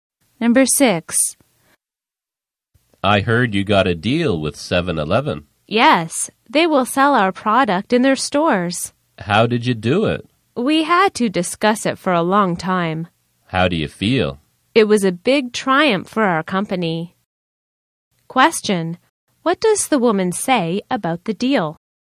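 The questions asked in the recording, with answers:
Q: What does the woman say about the deal?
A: It was a big triumph for their company.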